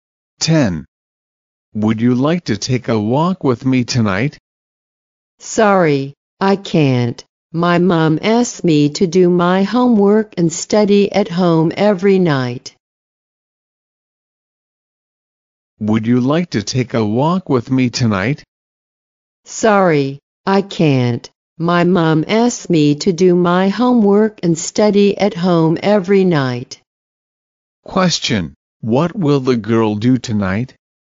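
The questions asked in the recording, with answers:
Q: What will the girl do tonight?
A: Do her homework and study at home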